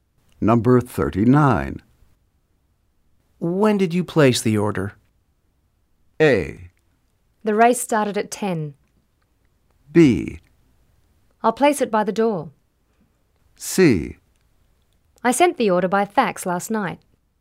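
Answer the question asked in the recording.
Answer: C: I sent the order by fax last night.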